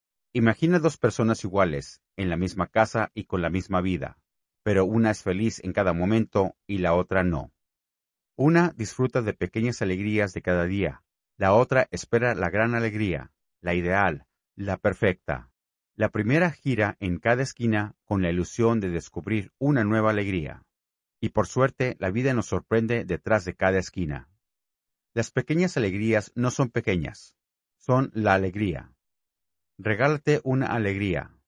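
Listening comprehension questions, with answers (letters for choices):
Usa esta actividad de comprensión auditiva para responder a las preguntas 10–13.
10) ¿Cuál es la idea principal del audio?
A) Promocionar un evento cultural en Andalucía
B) Contrastar dos actitudes ante la vida y valorar las pequeñas alegrías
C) Explicar un itinerario turístico por casas históricas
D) Describir problemas sociales en una comunidad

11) ¿Qué actitud tiene la persona que "disfruta las pequeñas alegrías de cada día"?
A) Expectativa constante por algo perfecto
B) Indiferencia hacia los detalles diarios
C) Apreciación y apertura a lo cotidiano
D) Nostalgia por el pasado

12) La frase "la otra espera la gran alegría la ideal la perfecta" sugiere que esa persona es:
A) Realista y pragmática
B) Exigente y centrada en expectativas altas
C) Activa en buscar pequeñas sorpresas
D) Desinteresada por la felicidad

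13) En el contexto del audio, la expresión "detrás de cada esquina" significa principalmente:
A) Que hay peligros ocultos en la ciudad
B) Que las sorpresas y oportunidades pueden aparecer en cualquier lugar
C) Que el narrador camina por un barrio antiguo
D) Que hay personas que se esconden físicamente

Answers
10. B
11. C
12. B
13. B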